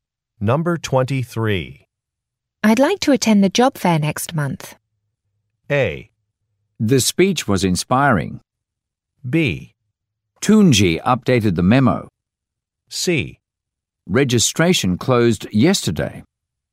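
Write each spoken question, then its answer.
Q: I'd like to attend the job fair next month.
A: C: Registration closed yesterday.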